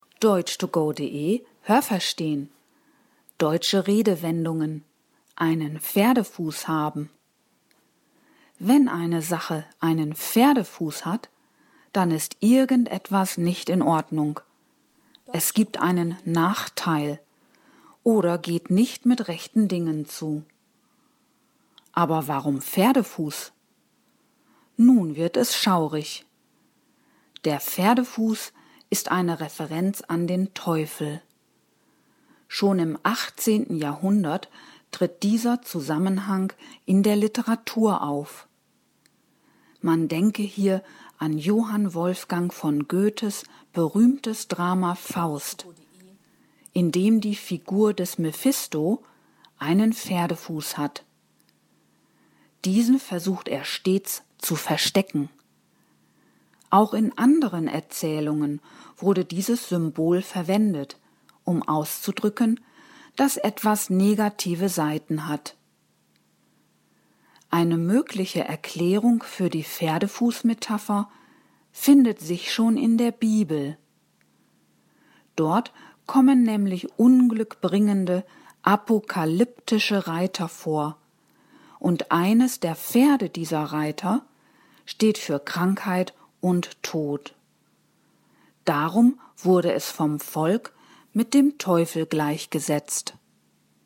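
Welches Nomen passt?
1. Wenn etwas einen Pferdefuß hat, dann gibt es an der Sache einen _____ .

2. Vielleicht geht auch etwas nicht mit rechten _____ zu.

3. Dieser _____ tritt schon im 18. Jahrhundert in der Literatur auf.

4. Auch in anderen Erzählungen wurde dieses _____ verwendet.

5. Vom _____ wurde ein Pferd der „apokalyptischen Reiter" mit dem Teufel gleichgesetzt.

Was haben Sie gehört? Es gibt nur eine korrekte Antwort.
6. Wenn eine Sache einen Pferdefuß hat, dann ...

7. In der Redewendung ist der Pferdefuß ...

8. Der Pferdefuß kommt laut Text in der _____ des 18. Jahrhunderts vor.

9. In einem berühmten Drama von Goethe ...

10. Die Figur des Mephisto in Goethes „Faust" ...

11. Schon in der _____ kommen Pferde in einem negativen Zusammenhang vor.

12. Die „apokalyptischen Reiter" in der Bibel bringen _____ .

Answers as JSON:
{"1": "Nachteil", "2": "Dingen", "3": "Zusammenhang", "4": "Symbol", "5": "Volk", "6": "ist irgendetwas nicht in Ordnung", "7": "eine Referenz an den Teufel", "8": "Literatur", "9": "hat die Figur des Mephisto einen Pferdefuß", "10": "versucht stets, seinen Pferdefuß zu verstecken", "11": "Bibel", "12": "Unglück"}

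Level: Hörtexte B (mittel)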